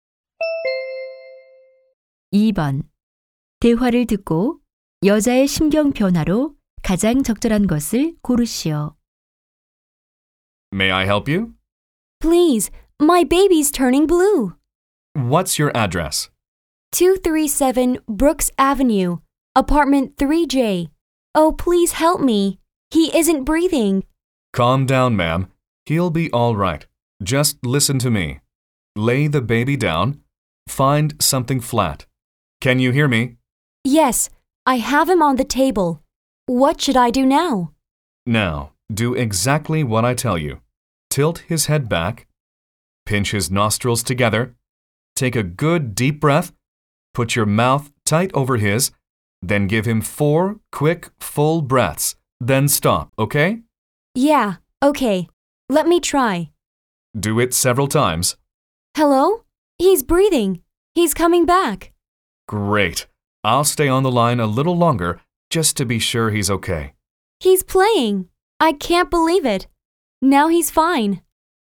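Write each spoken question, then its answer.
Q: 대화를 듣고 여자의 심경 변화로 가장 적절한 것을 고르시오.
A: 다급하고 겁에 질렸다가 안도함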